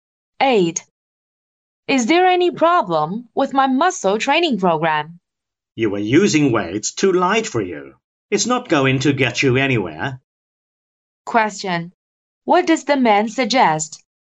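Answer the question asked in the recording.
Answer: Using heavier weights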